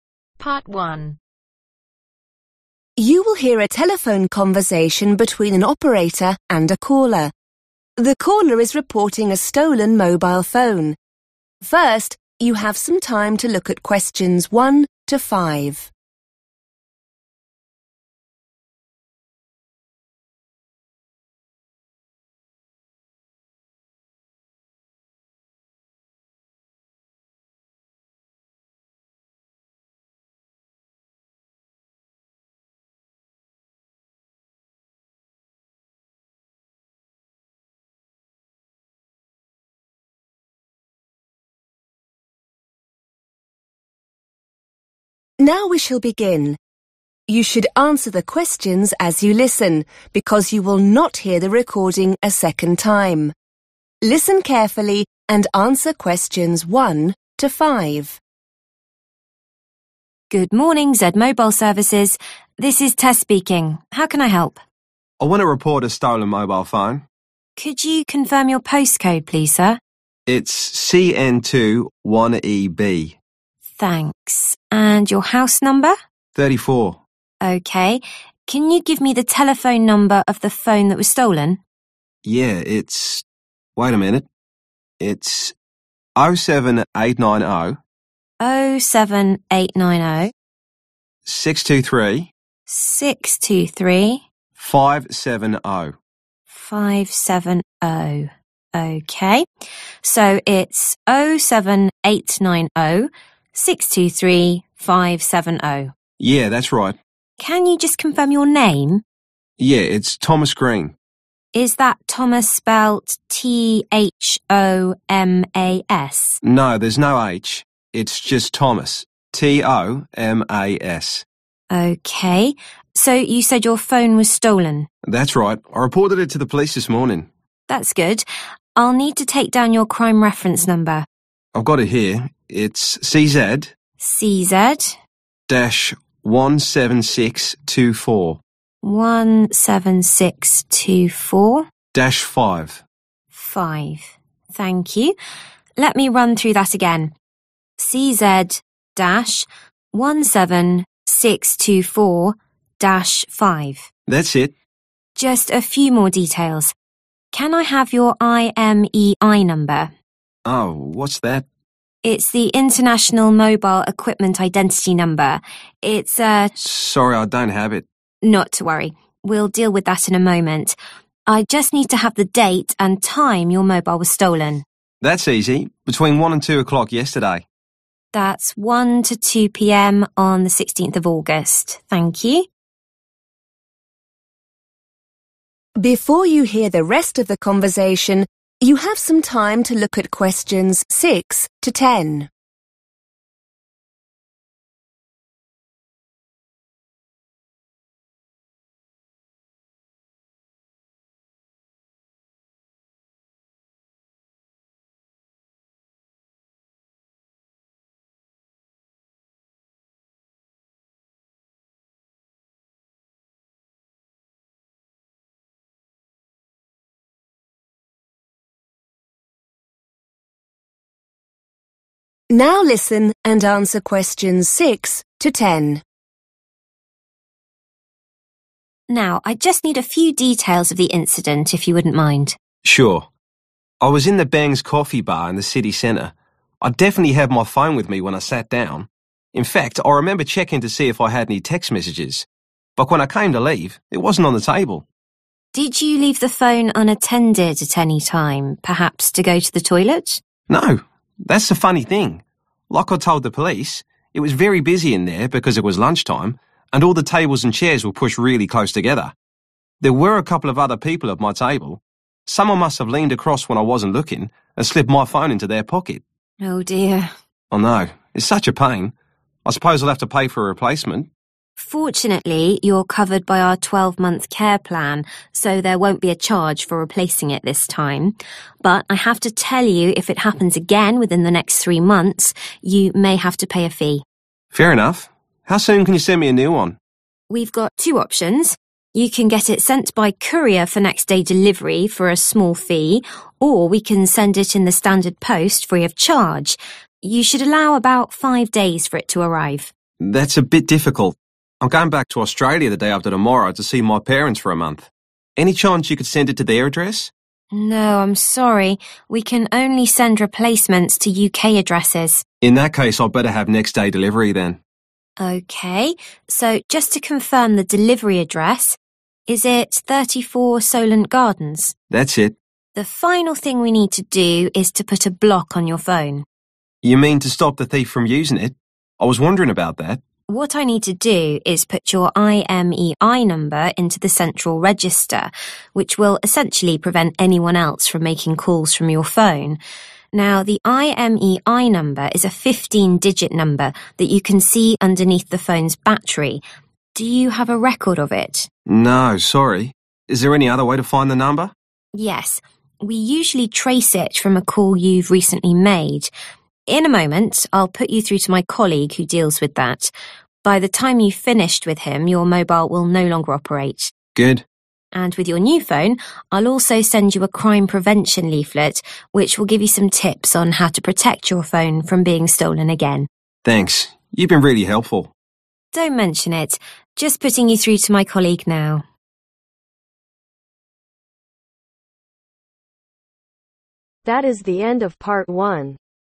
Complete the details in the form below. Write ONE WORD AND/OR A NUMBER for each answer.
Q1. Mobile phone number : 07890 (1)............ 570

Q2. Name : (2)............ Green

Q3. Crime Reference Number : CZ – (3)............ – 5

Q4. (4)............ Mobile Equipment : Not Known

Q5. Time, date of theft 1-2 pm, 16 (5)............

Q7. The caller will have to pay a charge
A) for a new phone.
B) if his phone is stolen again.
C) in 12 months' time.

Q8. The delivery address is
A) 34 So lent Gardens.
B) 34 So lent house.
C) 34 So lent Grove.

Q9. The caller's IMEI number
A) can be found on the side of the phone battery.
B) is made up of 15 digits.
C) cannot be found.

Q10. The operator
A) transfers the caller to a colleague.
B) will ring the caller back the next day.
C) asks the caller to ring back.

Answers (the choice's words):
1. 623
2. Tomas
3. 17624
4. International
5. August
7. if his phone is stolen again.
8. 34 So lent Gardens.
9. is made up of 15 digits.
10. transfers the caller to a colleague.